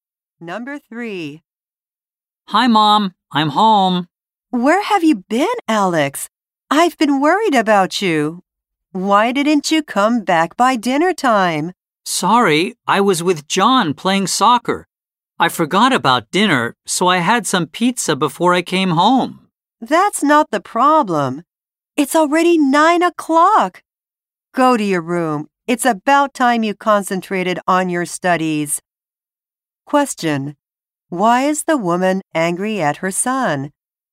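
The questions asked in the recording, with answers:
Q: Why is the woman angry at her son?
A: He came home very late (9 o'clock)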